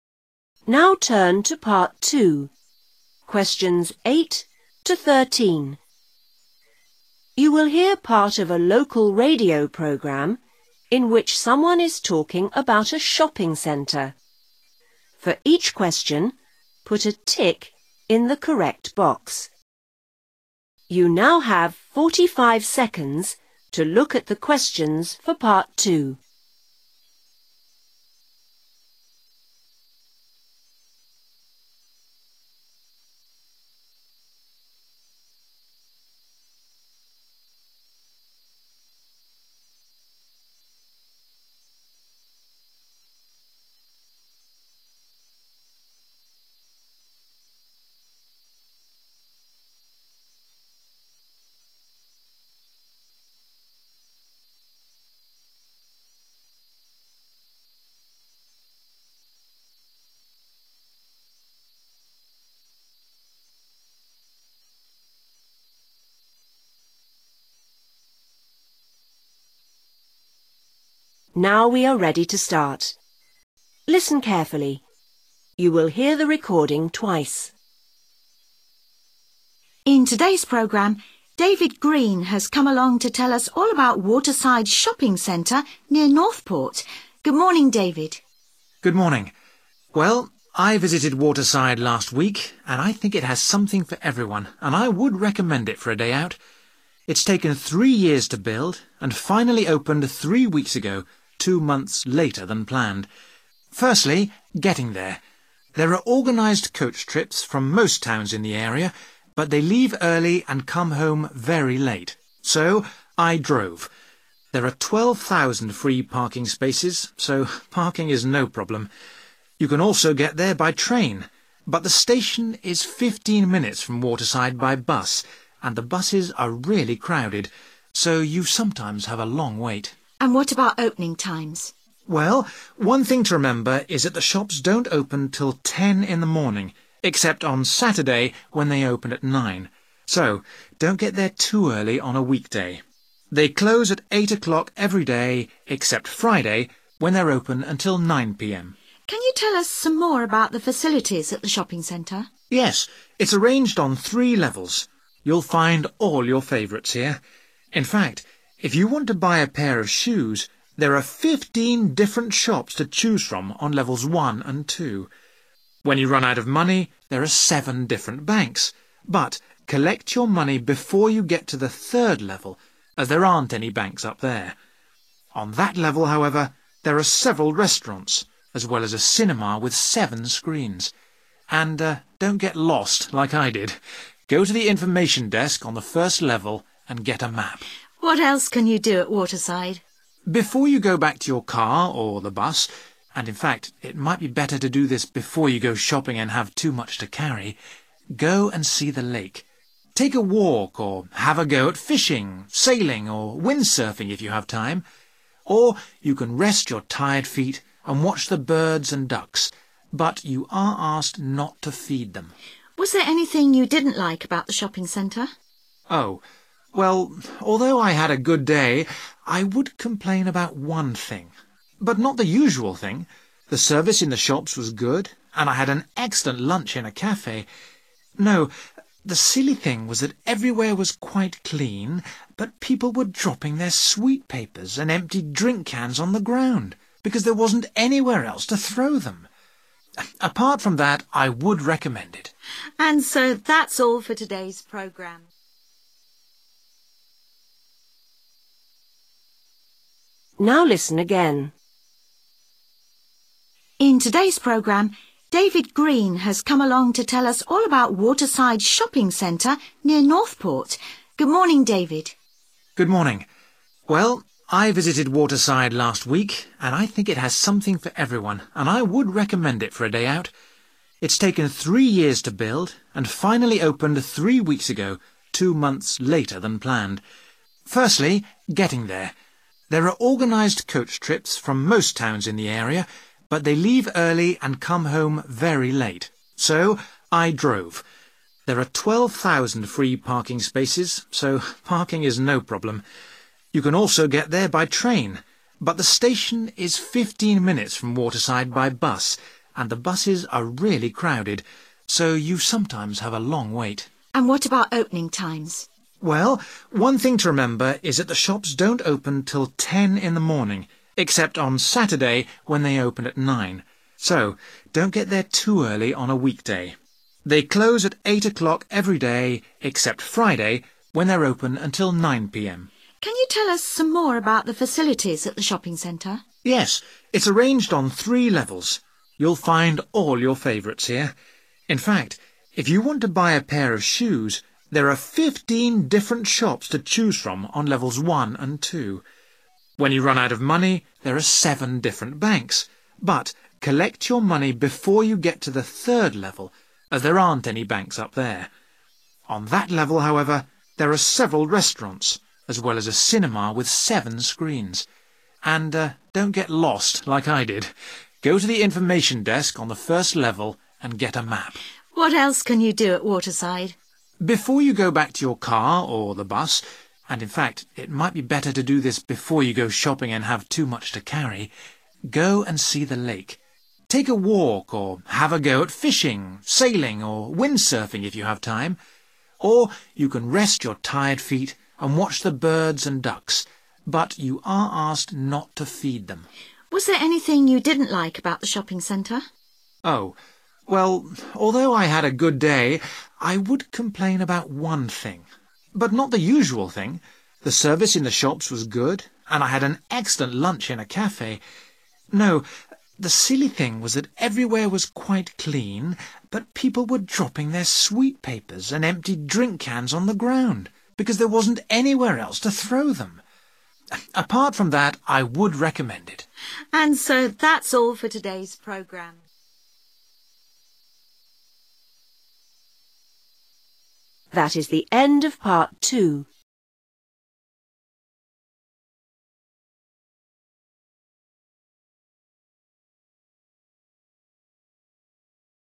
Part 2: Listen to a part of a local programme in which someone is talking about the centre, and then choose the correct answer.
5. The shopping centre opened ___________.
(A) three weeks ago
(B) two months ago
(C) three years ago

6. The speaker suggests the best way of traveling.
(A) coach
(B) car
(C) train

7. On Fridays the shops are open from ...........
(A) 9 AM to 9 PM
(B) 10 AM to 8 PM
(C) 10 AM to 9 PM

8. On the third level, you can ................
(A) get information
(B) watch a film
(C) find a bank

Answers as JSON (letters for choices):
{"5": "A", "6": "B", "7": "C", "8": "B"}

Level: lớp 6